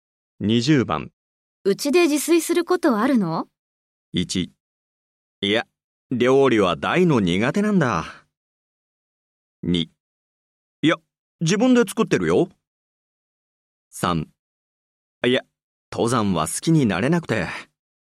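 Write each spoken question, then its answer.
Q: うちで自炊することあるの?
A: 1: いや、料理は大の苦手なんだ。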